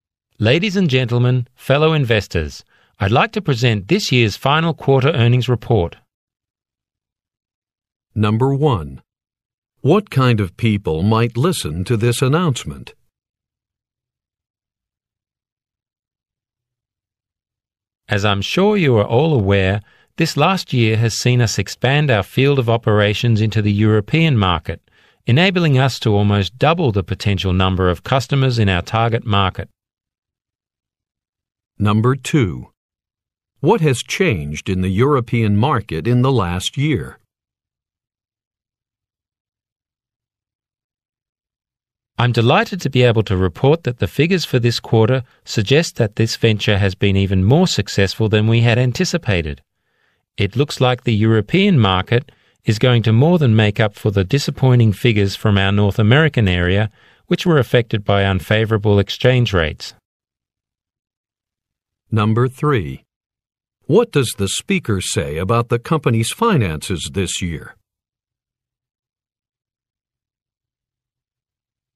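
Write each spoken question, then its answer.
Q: What kind of people might listen to this announcement?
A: Investors

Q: What has changed in the European market in the last year?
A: The company expanded its operations into it, almost doubling its potential customers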